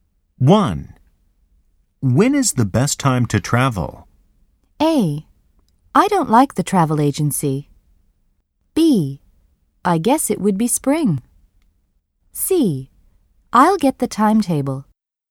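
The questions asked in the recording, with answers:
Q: When is the best time to travel?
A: B: I guess it would be spring.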